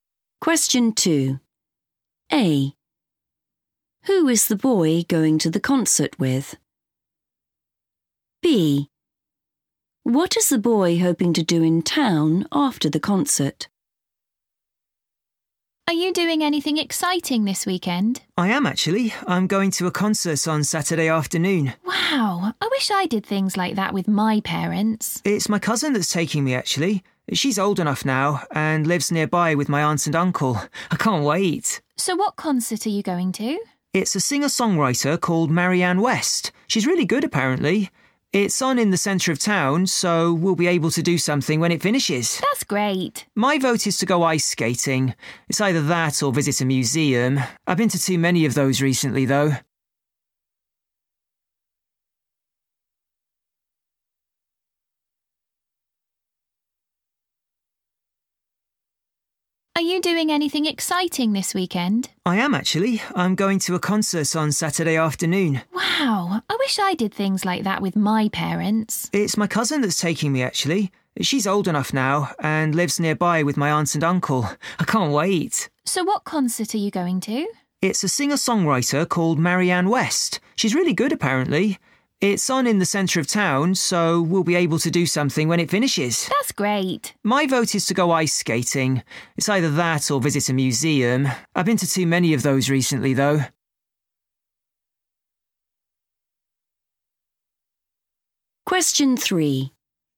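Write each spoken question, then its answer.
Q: Who is the boy going to the concert with?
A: his cousin

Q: What is the boy hoping to do in town after the concert?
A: go ice skating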